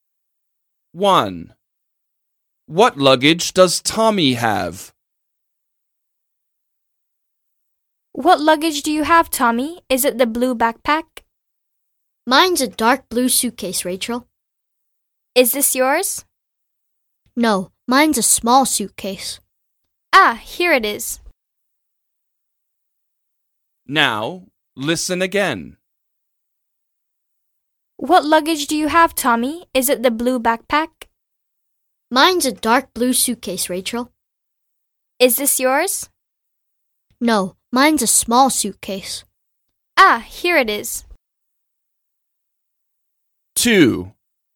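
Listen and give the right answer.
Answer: a small dark blue suitcase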